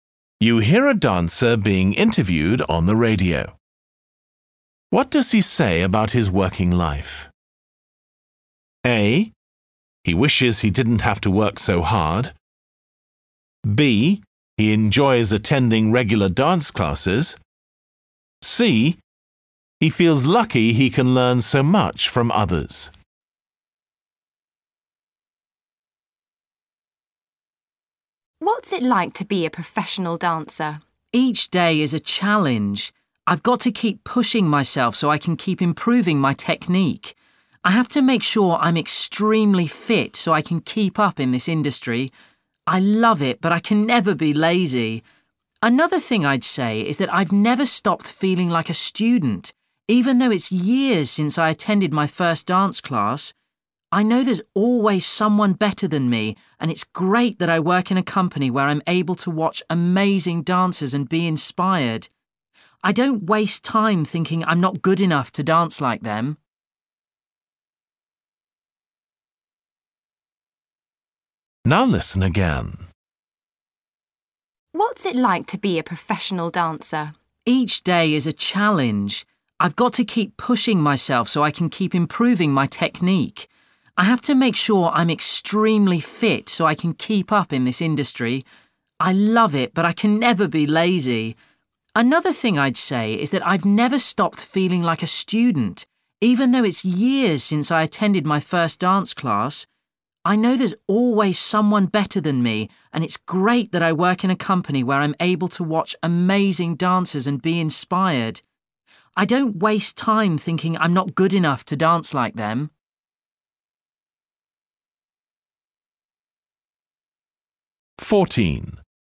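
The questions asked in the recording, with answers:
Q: What does he say about his working life?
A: C: He feels lucky he can learn so much from others.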